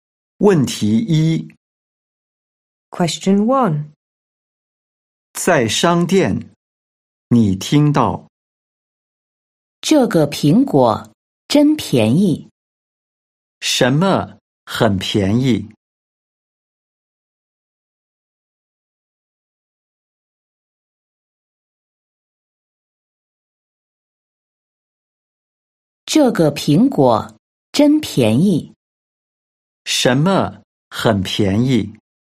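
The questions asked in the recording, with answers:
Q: 什么很便宜?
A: 这个苹果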